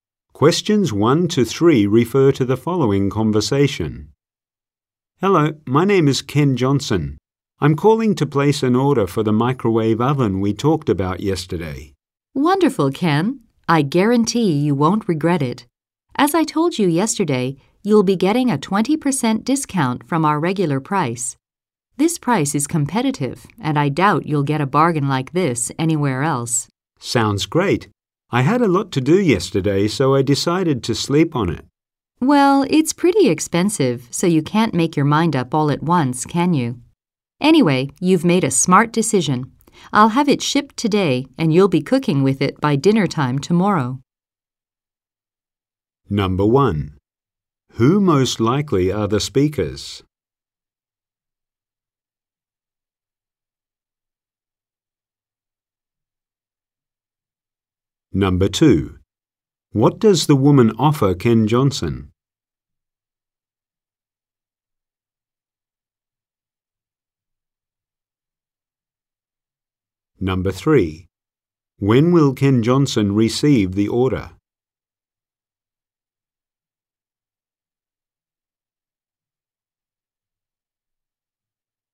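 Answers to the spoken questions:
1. A customer and a salesperson
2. A 20% discount
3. Tomorrow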